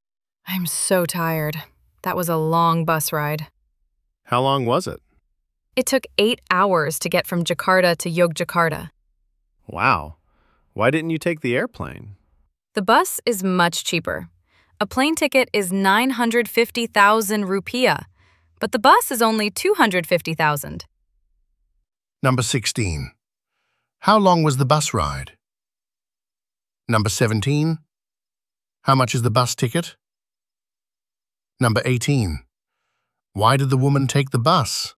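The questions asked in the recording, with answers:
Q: How long was the bus ride?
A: 8 hours

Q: How much is the bus ticket?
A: 250,000 rupiah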